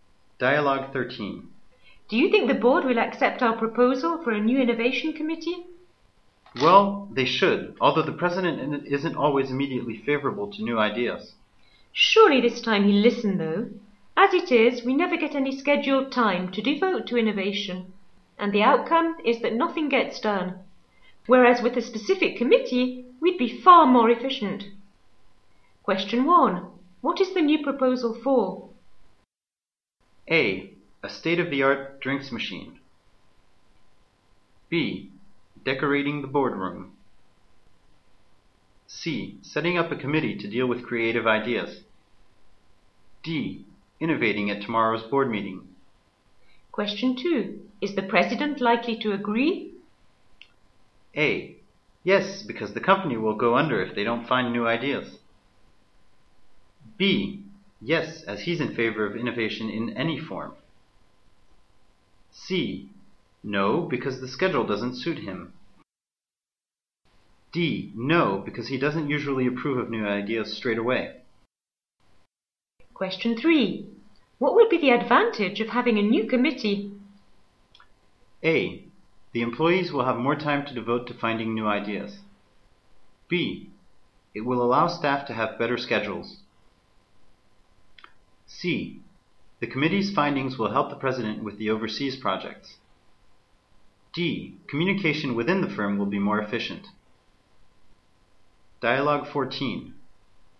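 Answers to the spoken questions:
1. C: Setting up a committee to deal with creative ideas.
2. D: No, because he doesn't usually approve of new ideas straight away.
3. A: The employees will have more time to devote to finding new ideas.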